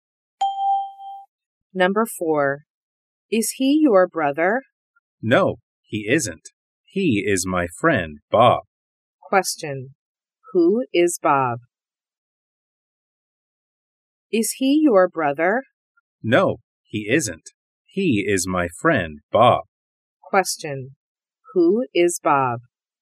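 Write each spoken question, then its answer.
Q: Who is Bob?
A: His friend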